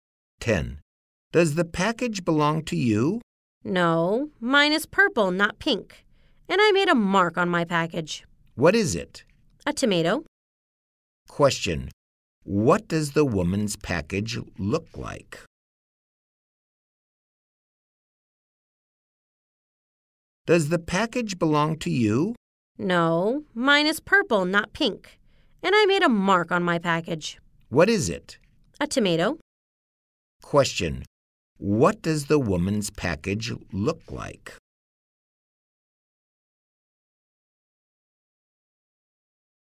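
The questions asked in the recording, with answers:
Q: What does the woman's package look like?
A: It is purple with a tomato mark on it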